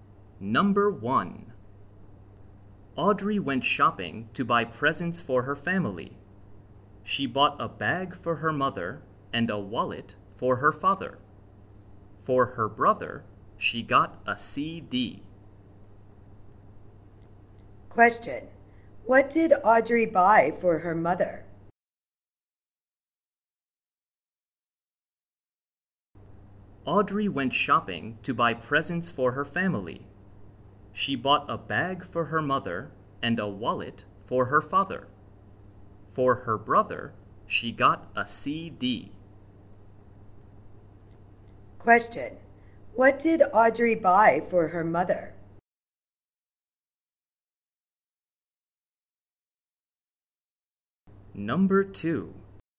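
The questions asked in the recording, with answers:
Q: What did Audrey buy for her mother?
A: A bag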